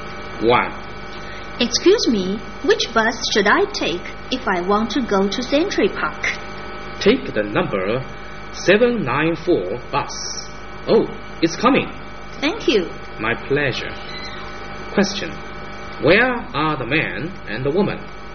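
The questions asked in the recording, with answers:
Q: Where are the man and the woman?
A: At a bus stop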